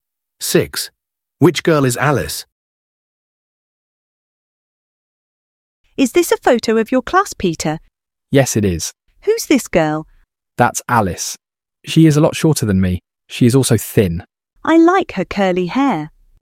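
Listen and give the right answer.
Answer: The short, thin girl with curly hair.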